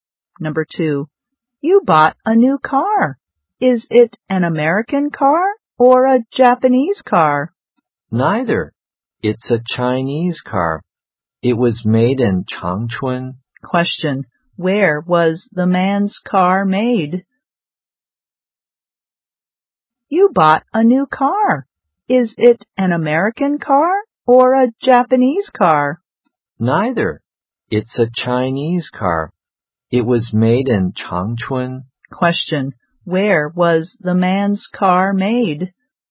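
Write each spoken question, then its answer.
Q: Question,Where was the man's car made?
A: In Changchun, China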